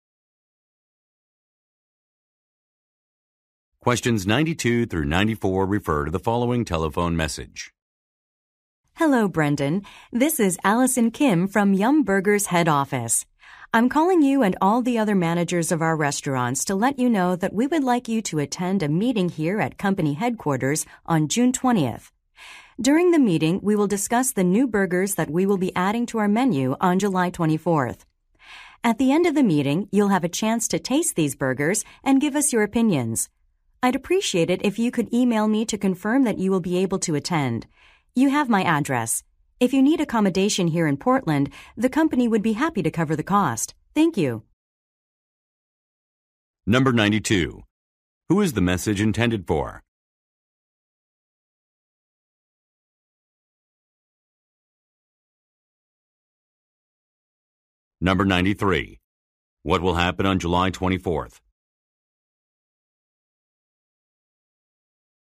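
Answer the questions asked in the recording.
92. A restaurant manager
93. New burgers will be added to the menu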